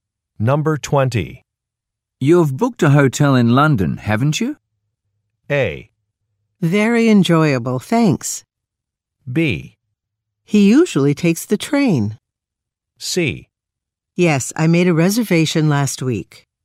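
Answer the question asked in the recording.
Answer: C: Yes, I made a reservation last week.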